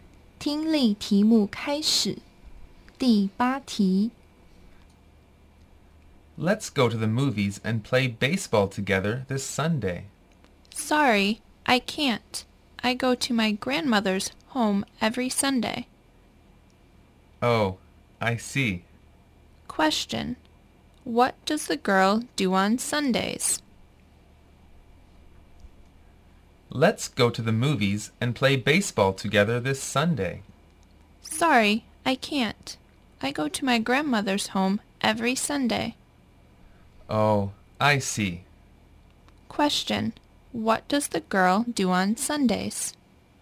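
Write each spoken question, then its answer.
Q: Question, what does the girl do on Sundays?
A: She goes to her grandmother's home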